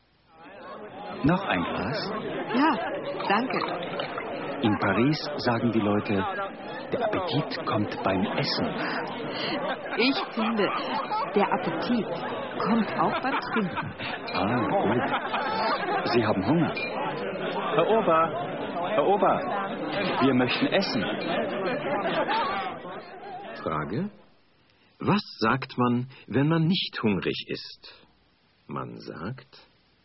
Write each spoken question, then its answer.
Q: Was sagt man, wenn man nicht hungrig ist?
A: Man sagt, der Appetit kommt beim Essen.